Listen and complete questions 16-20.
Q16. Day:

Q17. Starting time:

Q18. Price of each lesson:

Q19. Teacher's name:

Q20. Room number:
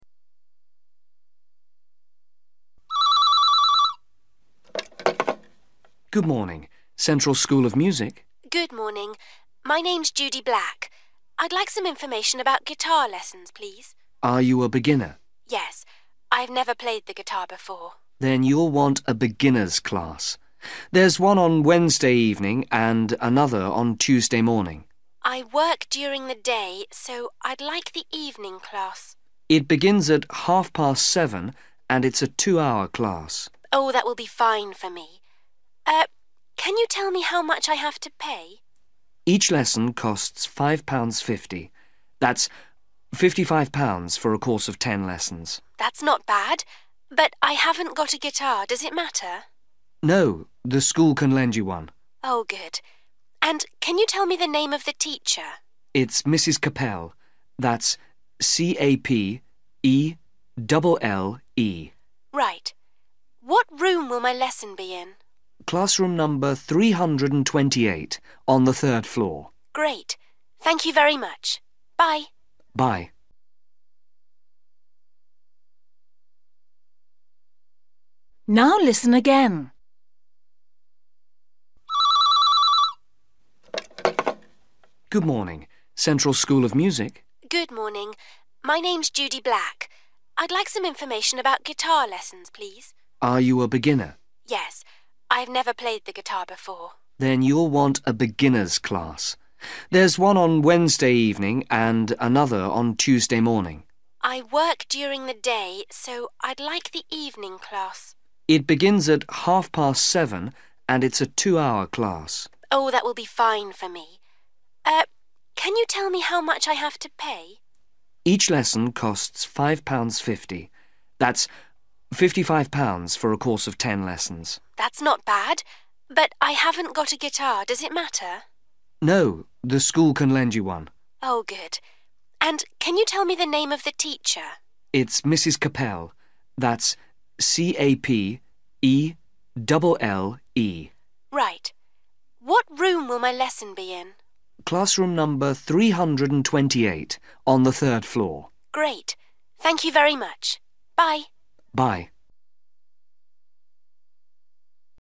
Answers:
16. Wednesday / Wed
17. 7.30 (p.m. / pm) / 19.30 / seven thirty / half past seven
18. (£)5.50
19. Capelle
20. 328 (on 3rd floor)

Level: A2